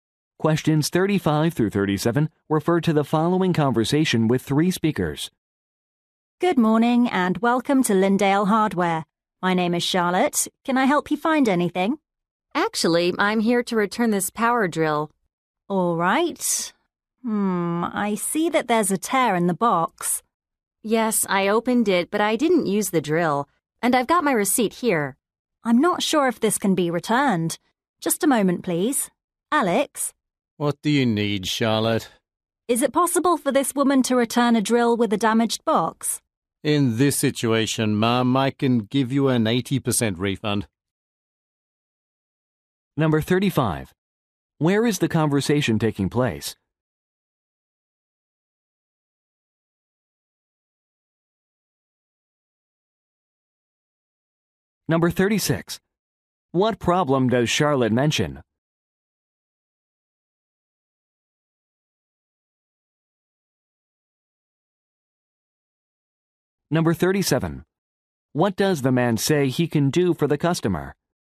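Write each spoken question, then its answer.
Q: Where is the conversation taking place?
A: At a hardware store

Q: What problem does Charlotte mention?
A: The box is torn

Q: What does the man say he can do for the customer?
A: Give an 80% refund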